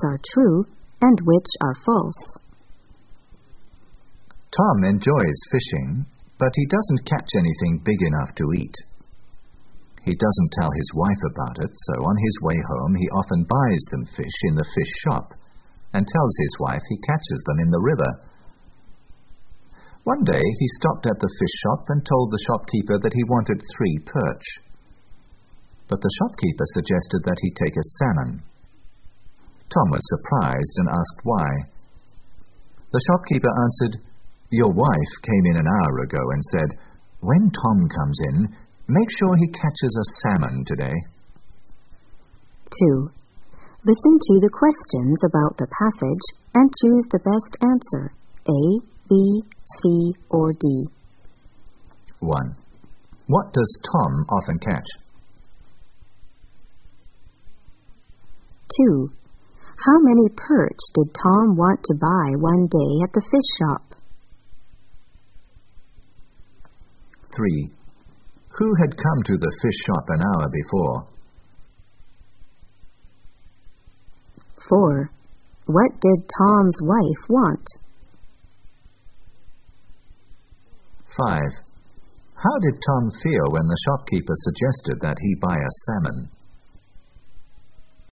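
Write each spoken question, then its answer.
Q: How many perch did Tom want to buy one day at the fish shop?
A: Three

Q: Who had come to the fish shop an hour before?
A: Tom's wife

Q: What did Tom's wife want?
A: She wanted Tom to bring home a salmon

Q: How did Tom feel when the shopkeeper suggested that he buy a salmon?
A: Surprised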